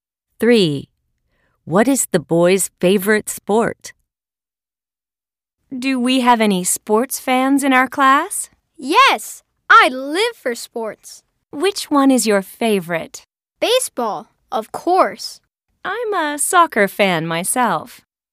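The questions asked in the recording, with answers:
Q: What is the boy's favorite sport?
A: baseball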